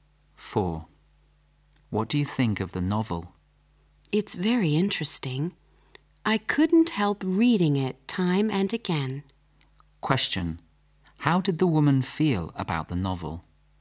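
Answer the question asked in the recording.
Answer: Very interesting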